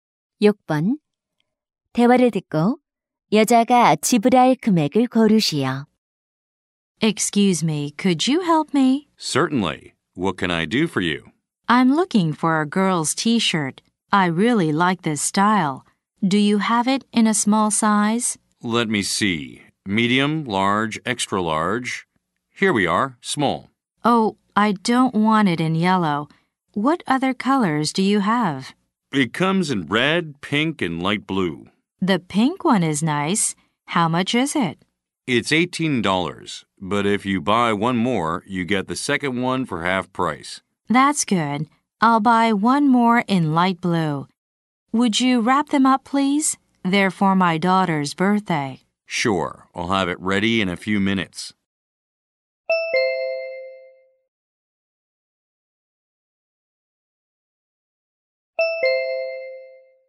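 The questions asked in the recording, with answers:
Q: 대화를 듣고 여자가 지불할 금액을 고르시오.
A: $27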